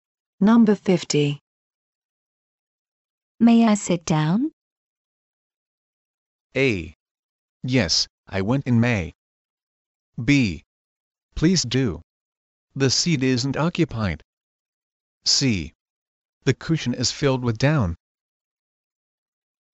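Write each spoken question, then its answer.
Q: May I sit down?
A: B: Please do. The seat isn't occupied.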